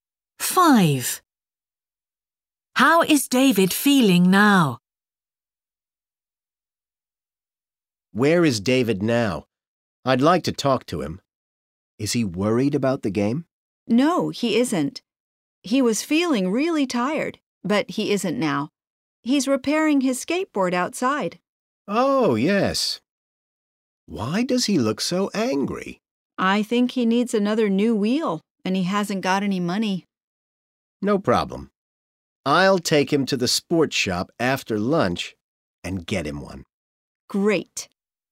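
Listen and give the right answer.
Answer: Angry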